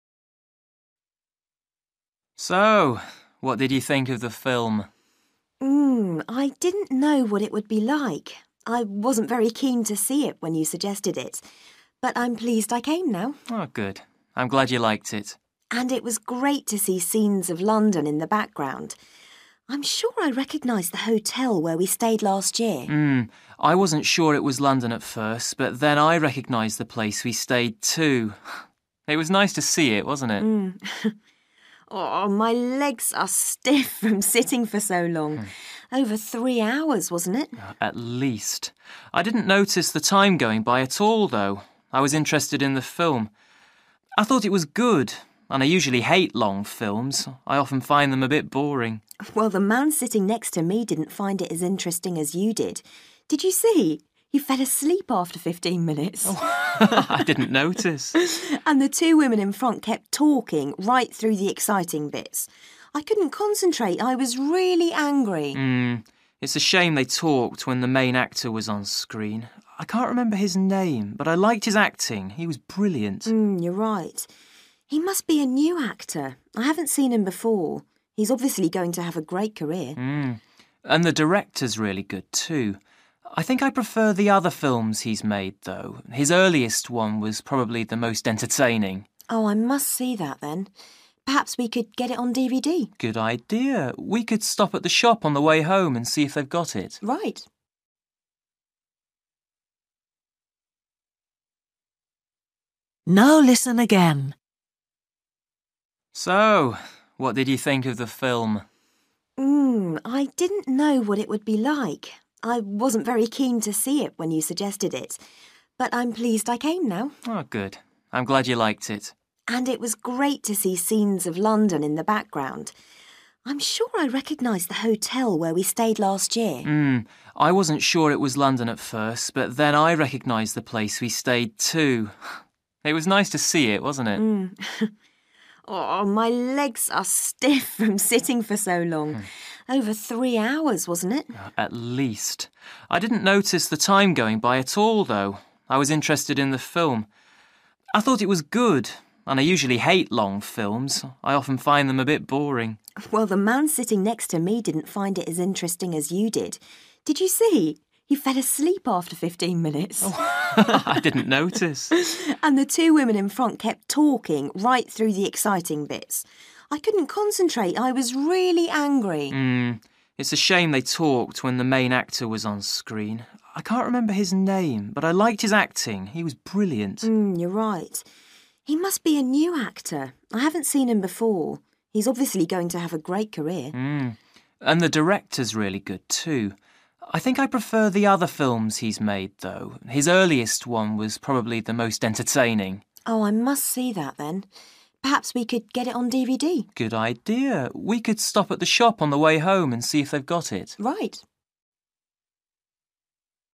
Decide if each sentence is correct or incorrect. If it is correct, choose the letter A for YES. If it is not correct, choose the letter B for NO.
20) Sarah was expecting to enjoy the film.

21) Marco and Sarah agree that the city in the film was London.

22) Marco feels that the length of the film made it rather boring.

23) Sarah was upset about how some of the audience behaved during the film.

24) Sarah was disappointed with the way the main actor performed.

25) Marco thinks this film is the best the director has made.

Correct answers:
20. NO
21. YES
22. NO
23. YES
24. NO
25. NO

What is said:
Marco: So ... what did you think of the film?
I didn't know what it would be like. I wasn't very keen to see it when you suggested it, but I'm pleased I came now.
Marco: Oh, good. I'm glad you liked it.
Sarah: And it was great to see scenes of London in the background. I'm sure I recognised the hotel where we stayed last year.
I wasn't sure it was London at first, but then I recognised the place we stayed, too. It was nice to see it, wasn't it?
Sarah: Oooh, my legs are stiff from sitting for so long. Over three hours, wasn't it?
Marco: At least. I didn't notice the time going by at all, though – I was interested in the film. I thought it was good – and I usually hate long films! I often find them a bit boring.
Sarah: Well, the man sitting next to me didn't find it as interesting as you did. Did you see he fell asleep after fifteen minutes?
Sarah: And the two women in front kept talking right through the exciting bits. I couldn't concentrate. I was really angry.
it's a shame they talked when the main actor was on screen. I can't remember his name, but I liked his acting. He was brilliant.
you're right. He must be a new actor – I haven't seen him before. He's obviously going to have a great career.
and the director's really good, too. I think I prefer the other films he's made, though. His earliest one was probably the most entertaining.
Sarah: Oh, I must see that, then. Perhaps we can get it on DVD ...
Marco: Good idea. We could stop at the shop on the way home, and see if they've got it.
Sarah: Right.

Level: B1